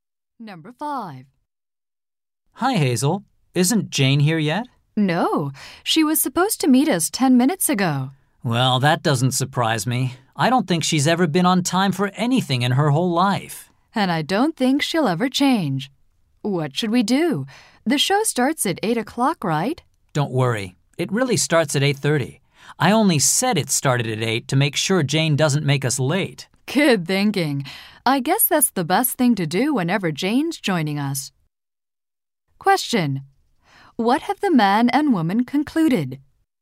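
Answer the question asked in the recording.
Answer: It's best to tell Jane an earlier time so she isn't late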